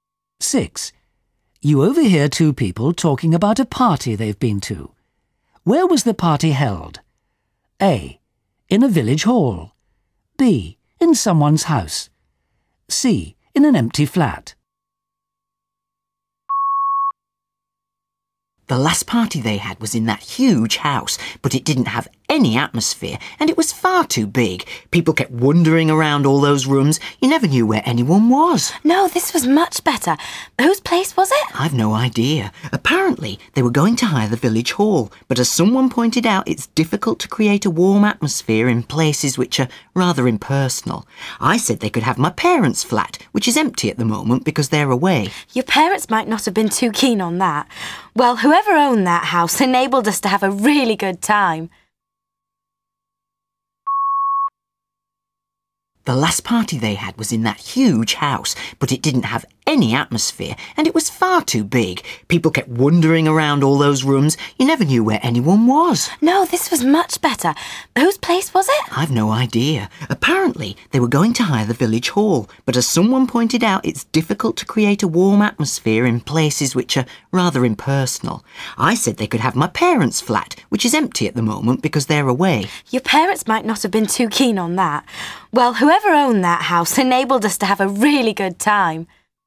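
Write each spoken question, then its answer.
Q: Where was the party held?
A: B: In someone's house.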